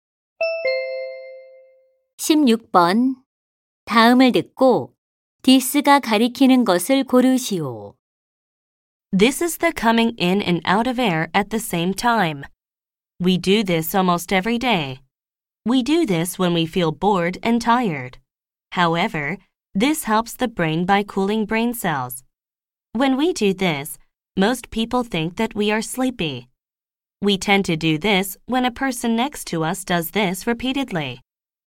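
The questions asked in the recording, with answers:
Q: 다음을 듣고 디스가 가리키는 것을 고르시오.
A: 하품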